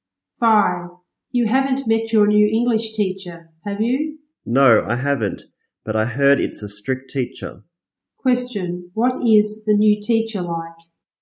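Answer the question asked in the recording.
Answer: Strict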